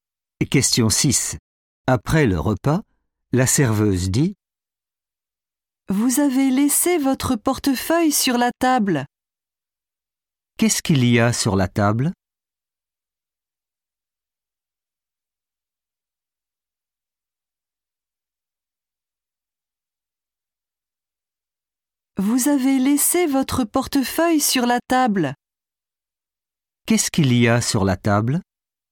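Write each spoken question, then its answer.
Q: Qu'est-ce qu'il y a sur la table?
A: votre portefeuille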